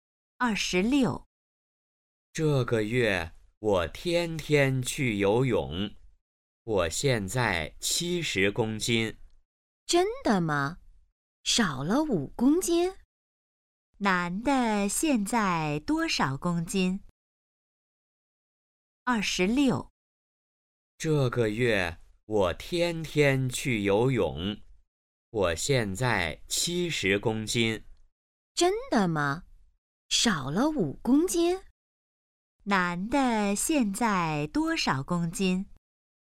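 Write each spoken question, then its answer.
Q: 男的现在多少公斤?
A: 70公斤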